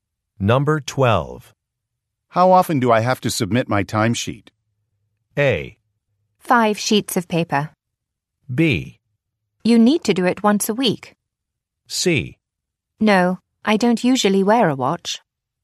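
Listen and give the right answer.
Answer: B: You need to do it once a week.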